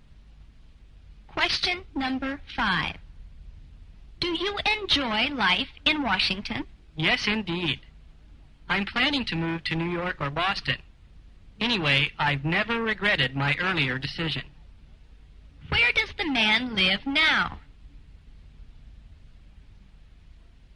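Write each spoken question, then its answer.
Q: Where does the man live now?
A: In Washington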